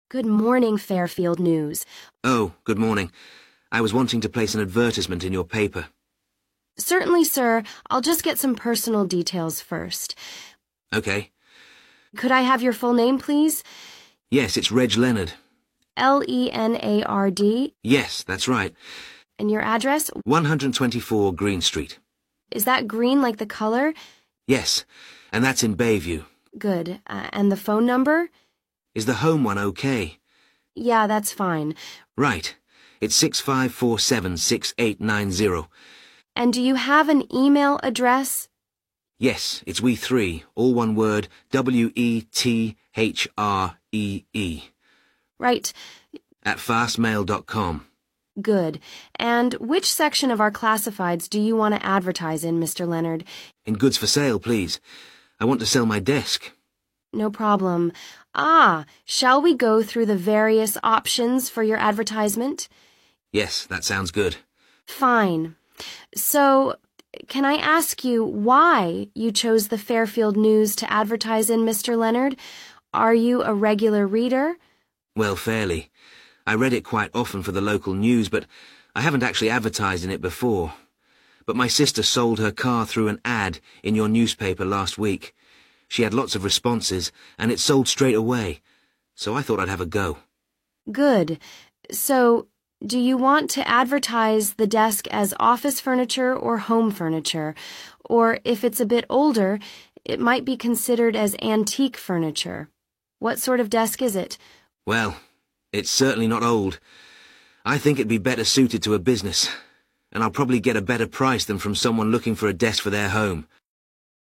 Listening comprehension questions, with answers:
Complete the notes below. Write NO MORE THAN THREE WORDS AND/OR A NUMBER for each answer.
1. Address: 1. ________________________________ Street, Bayview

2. Phone number: 2. ________________________________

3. Where to advertise: In 3. ________________________________ section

Choose the correct letter, A, B or C.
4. Why does he choose the company?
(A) a relative's successful experience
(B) cheaper than other sources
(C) previous advertising experience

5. What type of furniture is the desk?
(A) Antique furniture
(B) Home furniture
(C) Office furniture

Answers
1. 124 green
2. 65476890
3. goods for sale
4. (A) a relative's successful experience
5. (C) Office furniture

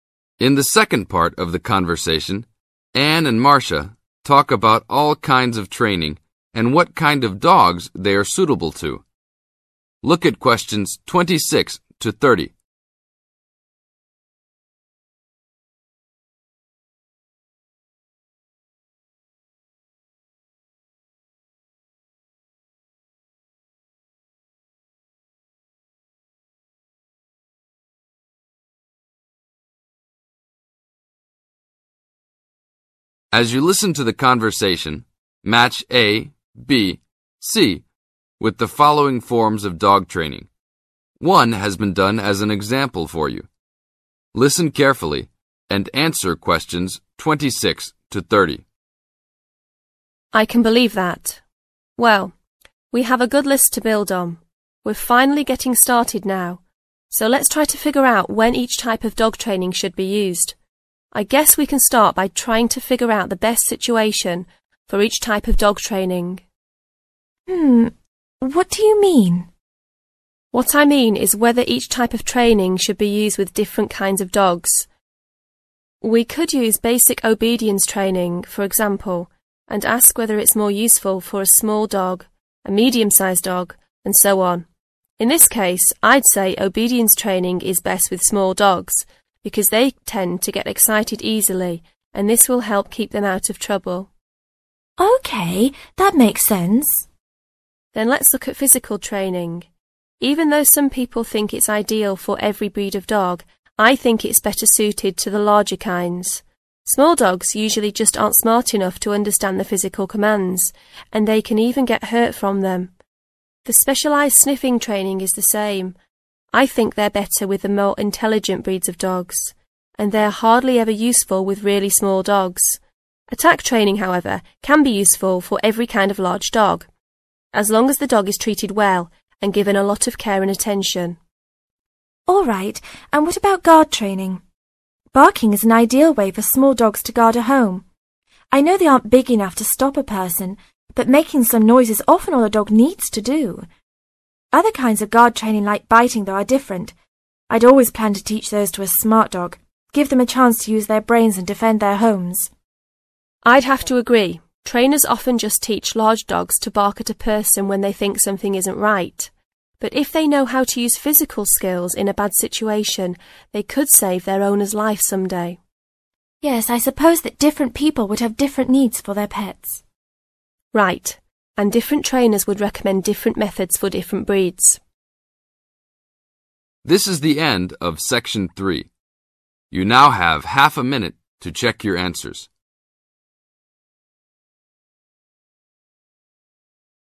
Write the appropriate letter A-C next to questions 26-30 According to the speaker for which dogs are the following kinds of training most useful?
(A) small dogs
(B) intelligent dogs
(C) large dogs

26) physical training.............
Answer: (C) large dogs

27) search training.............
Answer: (B) intelligent dogs

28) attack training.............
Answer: (C) large dogs

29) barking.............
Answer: (A) small dogs

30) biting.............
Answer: (B) intelligent dogs

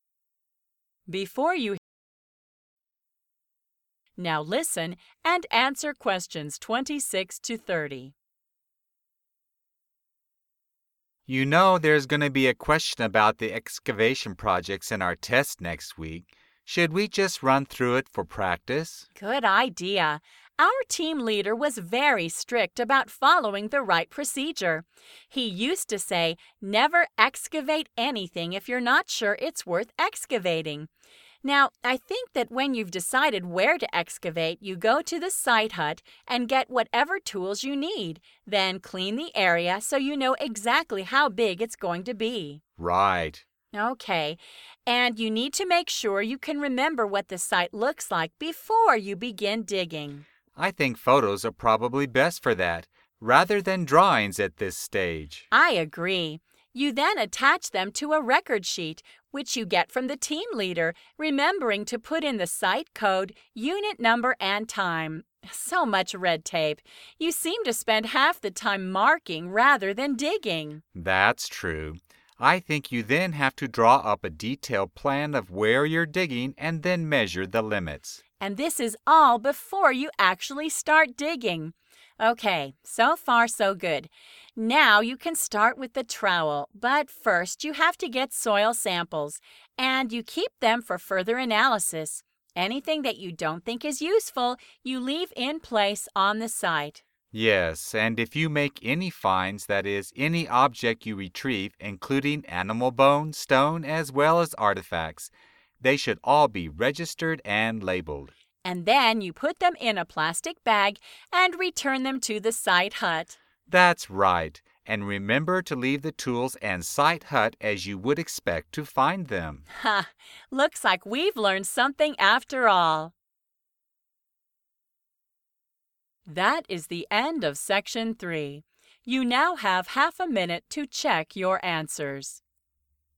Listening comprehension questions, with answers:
Complete the flow chart below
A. some soil samples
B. some photographs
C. objects to team leader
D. labels on objects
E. a record sheet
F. a unit number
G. further analysis of objects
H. tools from the site hut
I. comprehensive plan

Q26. Take 26............ and clean the areas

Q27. And your room leader for 27............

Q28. Make 28............ of the site and measure the levels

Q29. Take 29............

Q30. Register and get 30............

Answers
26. H. tools from the site hut
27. E. a record sheet
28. I. comprehensive plan
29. A. some soil samples
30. D. labels on objects

